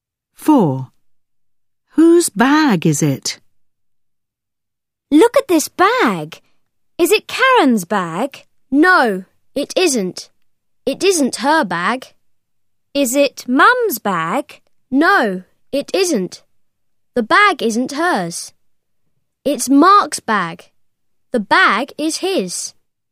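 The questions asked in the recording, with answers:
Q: Whose bag is it?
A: Mark's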